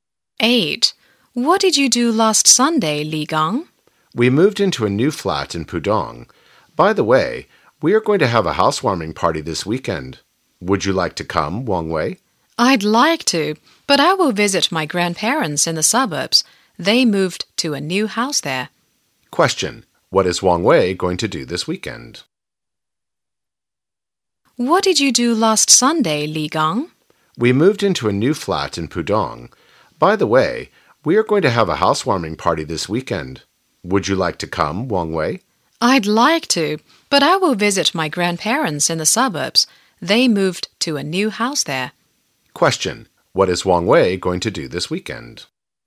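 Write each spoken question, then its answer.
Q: What is Wang Wei going to do this weekend?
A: Visit his grandparents in the suburbs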